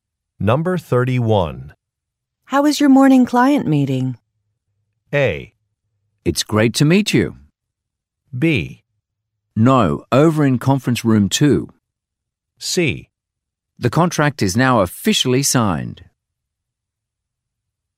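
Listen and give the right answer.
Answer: C: The contract is now officially signed.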